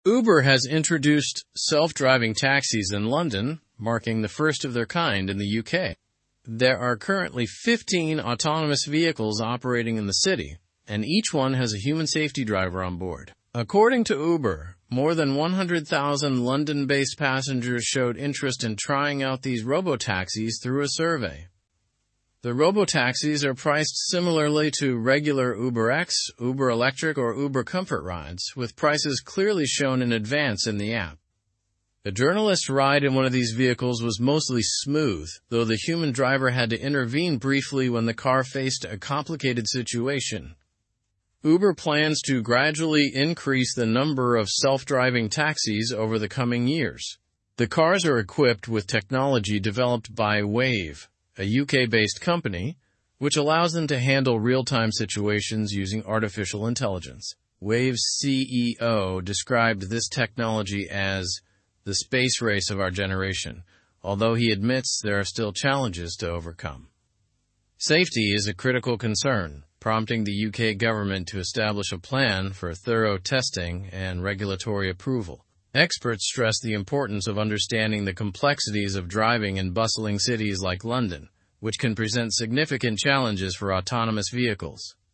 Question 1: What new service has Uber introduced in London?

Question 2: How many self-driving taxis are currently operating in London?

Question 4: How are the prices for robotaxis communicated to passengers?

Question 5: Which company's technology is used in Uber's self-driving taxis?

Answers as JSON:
{"1": "Uber has introduced self-driving taxis in London.", "2": "There are currently 15 self-driving taxis.", "4": "Prices are shown in advance in the app.", "5": "The technology is developed by Wayve."}

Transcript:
Uber has introduced self-driving taxis in London, marking the first of their kind in the UK. There are currently 15 autonomous vehicles operating in the city, and each one has a human safety driver on board. According to Uber, more than 100,000 London-based passengers showed interest in trying out these robotaxis through a survey.
The robotaxis are priced similarly to regular UberX, Uber Electric, or Uber Comfort rides, with prices clearly shown in advance in the app. A journalist's ride in one of these vehicles was mostly smooth, though the human driver had to intervene briefly when the car faced a complicated situation.
Uber plans to gradually increase the number of self-driving taxis over the coming years. The cars are equipped with technology developed by Wayve, a UK-based company, which allows them to handle real-time situations using artificial intelligence. Wayve's CEO described this technology as 'the space race of our generation', although he admits there are still challenges to overcome.
Safety is a critical concern, prompting the UK government to establish a plan for thorough testing and regulatory approval. Experts stress the importance of understanding the complexities of driving in bustling cities like London, which can present significant challenges for autonomous vehicles.

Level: Level 3